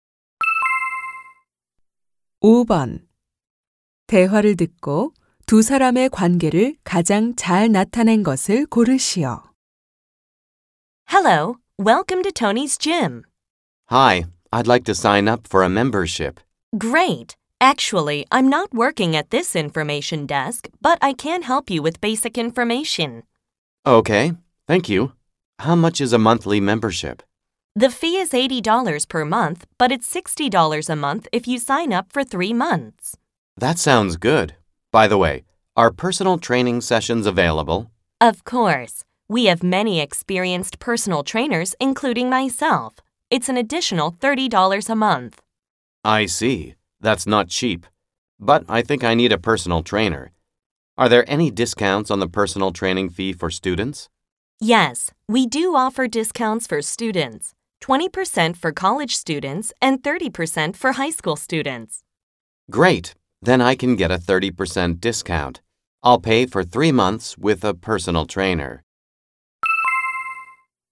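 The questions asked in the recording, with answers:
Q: 대화를 듣고 두 사람의 관계를 가장 잘 나타낸 것을 고르시오.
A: 헬스장 개인 트레이너 - 회원 가입자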